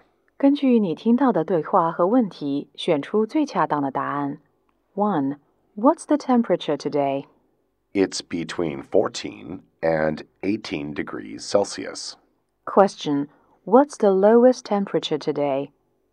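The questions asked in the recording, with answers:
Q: What's the lowest temperature today?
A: 14 degrees Celsius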